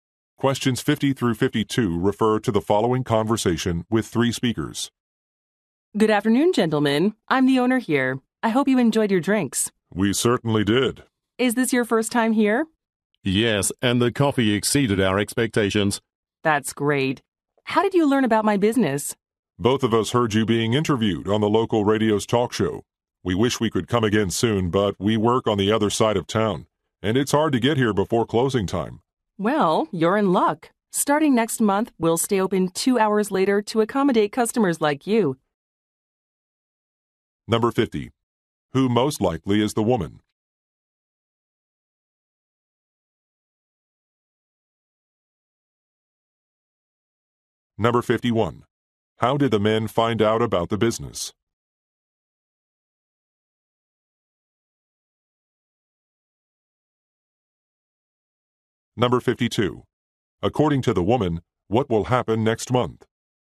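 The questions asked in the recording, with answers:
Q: Who most likely is the woman?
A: A café owner

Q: How did the men find out about the business?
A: From a local radio interview

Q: According to the woman, what will happen next month?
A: The business will stay open 2 hours later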